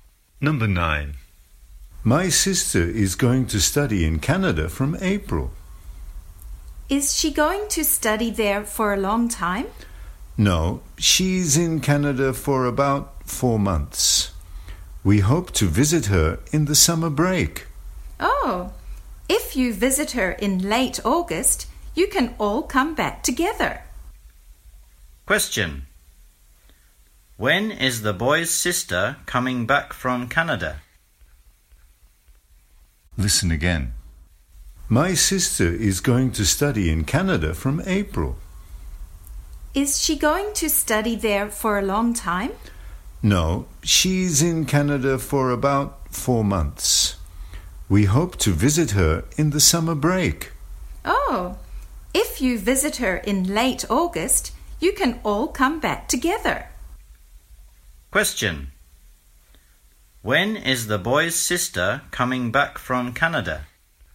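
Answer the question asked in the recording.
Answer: In late August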